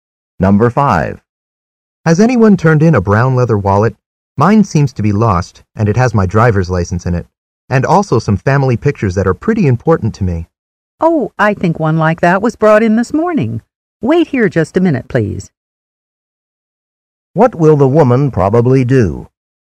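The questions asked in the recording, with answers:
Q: What will the woman probably do?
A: Go and get the wallet that was turned in.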